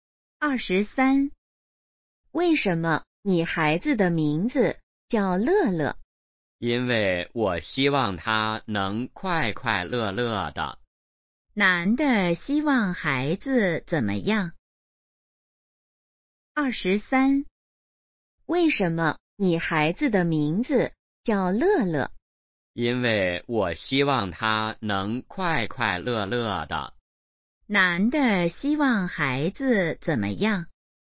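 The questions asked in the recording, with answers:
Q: 男的希望孩子怎么样?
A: 快快乐乐的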